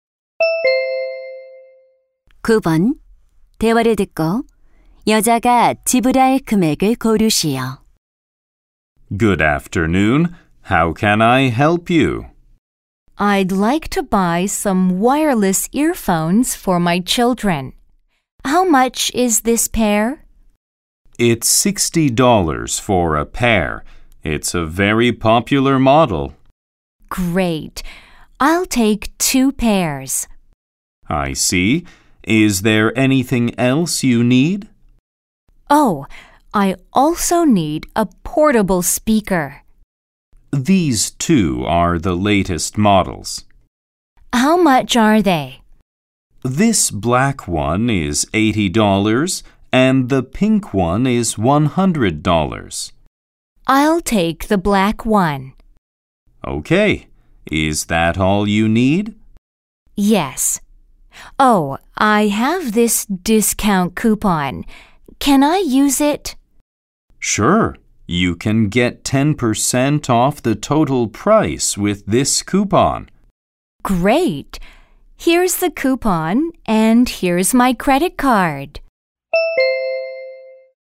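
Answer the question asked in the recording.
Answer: $180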